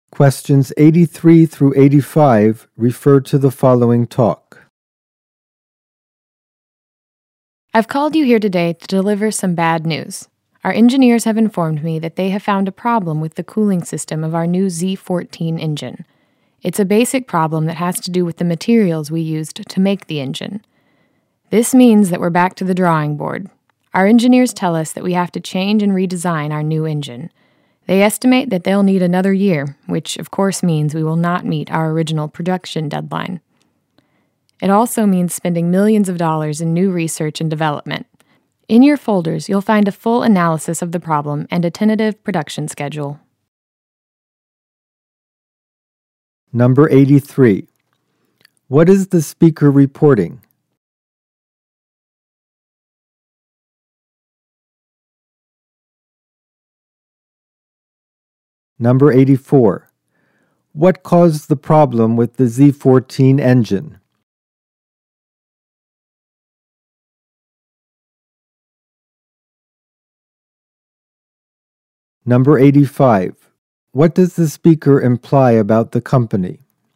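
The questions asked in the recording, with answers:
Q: What is the speaker reporting?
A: A problem found with the cooling system of the new Z14 engine

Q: What caused the problem with the Z14 engine?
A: The materials used to make the engine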